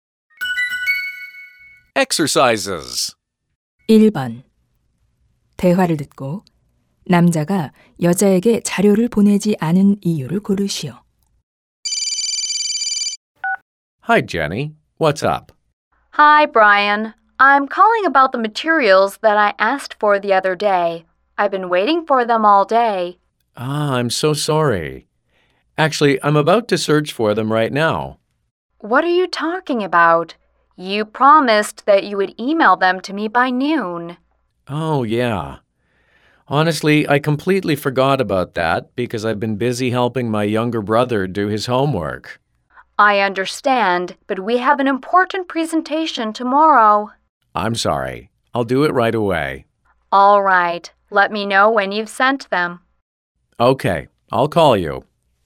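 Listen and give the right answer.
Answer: 남동생 숙제를 돕느라 잊어버려서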